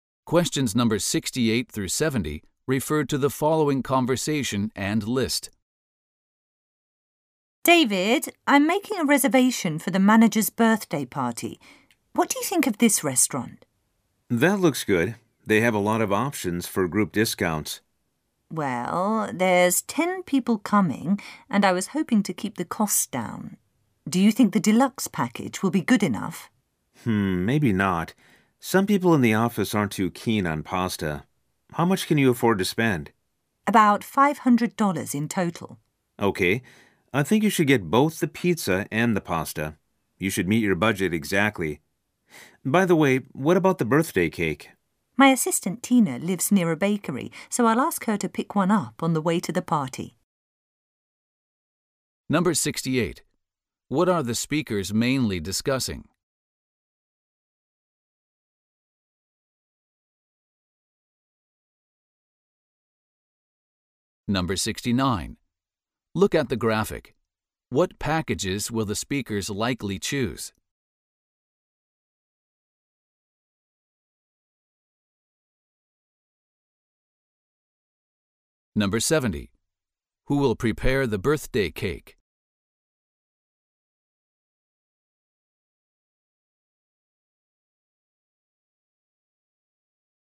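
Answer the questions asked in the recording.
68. Making a restaurant reservation for the manager's birthday party
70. Tina, the woman's assistant (she'll pick one up from a bakery)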